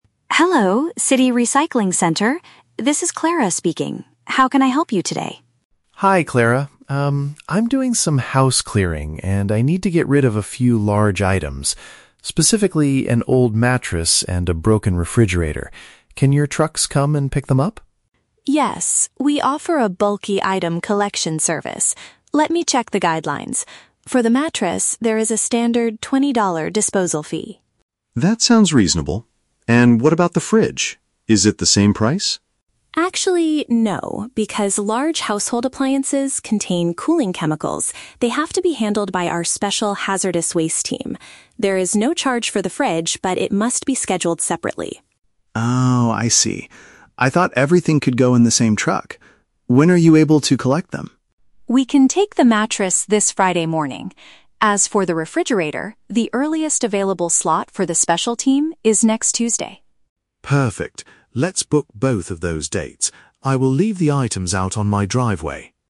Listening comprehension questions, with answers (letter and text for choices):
Listen to the telephone conversation between a resident and a recycling center employee, then choose the correct answer (A, B, or C) for each question.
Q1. What does the man need assistance with?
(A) Buying a new refrigerator for his kitchen.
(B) Removing some large pieces of furniture and equipment.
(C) Hiring a professional team to clean his driveway.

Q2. What is true about the cost of the service?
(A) He has to pay for the bed, but the appliance is free.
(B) Both items will cost him twenty dollars each to remove.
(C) He must pay a higher penalty fee for the refrigerator.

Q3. When will the city workers collect the refrigerator?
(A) At the end of the current week.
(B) Early next week.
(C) On the same day as the mattress.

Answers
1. (B) Removing some large pieces of furniture and equipment.
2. (A) He has to pay for the bed, but the appliance is free.
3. (B) Early next week.

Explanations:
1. Tom says he needs to "get rid of a few large items," specifically a mattress (furniture) and a refrigerator (equipment). Option (B) is a paraphrase of this. Option (A) is a trap; the word "refrigerator" is mentioned, but he is throwing a broken one away, not buying a new one. Option (C) is a trap; he mentions his "driveway" at the end, but he isn't hiring anyone to clean it.
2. Clara states there is a "$20 disposal fee" for the mattress (bed) and "no charge" for the fridge (appliance). Option (A) uses synonyms for the items. Option (B) is a trap; only the mattress costs $20. Option (C) is a trap; the fridge requires a "special team" because of chemicals, but there is no higher fee (it's free).
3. Clara says the earliest slot for the refrigerator is "next Tuesday," which corresponds to "early next week." Option (A) is a trap; the end of the current week (Friday) is when they will collect the mattress, not the fridge. Option (C) is a trap; Tom initially "thought everything could go in the same truck," but Clara explains they must be scheduled on different days.

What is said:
Clara: Hello, City Recycling Center. This is Clara speaking. How can I help you today?
Tom: Hi Clara. Um, I'm doing some house clearing and I need to get rid of a few large items. Specifically, an old mattress and a broken refrigerator. Can your trucks come and pick them up?
Clara: Yes, we offer a bulky item collection service. Let me check the guidelines. For the mattress, there is a standard twenty-dollar disposal fee.
Tom: That sounds reasonable. And what about the fridge? Is it the same price?
Clara: Actually, no. Because large household appliances contain cooling chemicals, they have to be handled by our special hazardous waste team. There is no charge for the fridge, but it must be scheduled separately.
Tom: Oh, I see. I thought everything could go in the same truck. When are you able to collect them?
Clara: We can take the mattress this Friday morning. As for the refrigerator, the earliest available slot for the special team is next Tuesday.
Tom: Perfect. Let's book both of those dates. I will leave the items out on my driveway.